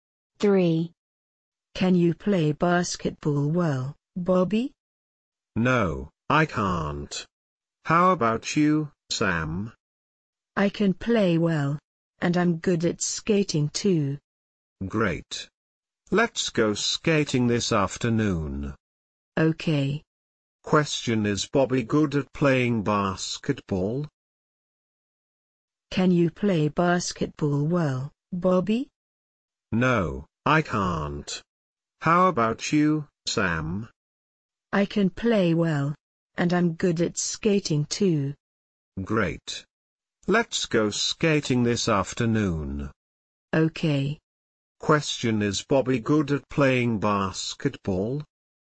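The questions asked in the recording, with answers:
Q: Question, is Bobby good at playing basketball?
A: No, he isn't.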